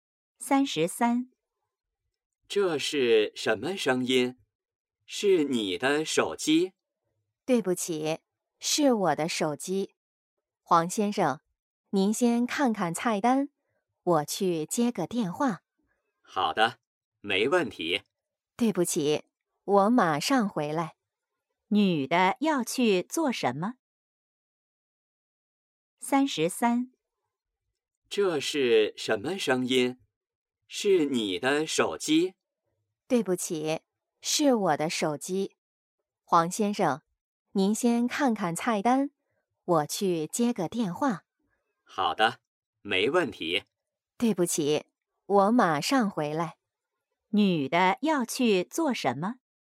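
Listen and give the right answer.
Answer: 接电话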